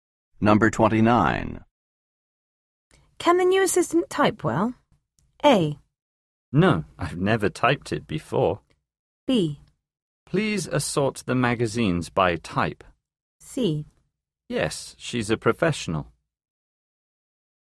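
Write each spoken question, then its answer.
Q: Can the new assistant type well?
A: C: Yes, she's a professional.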